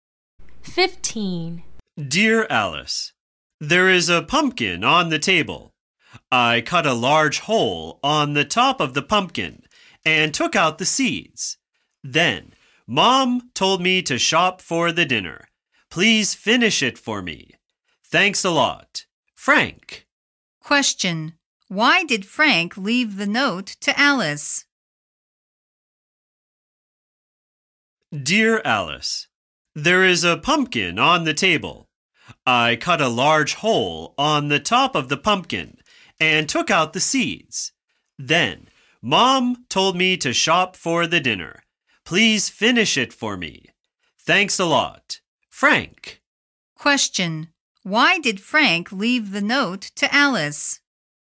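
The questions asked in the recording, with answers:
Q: Why did Frank leave the note to Alice?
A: To ask Alice to finish the pumpkin for him because he had to go shopping for dinner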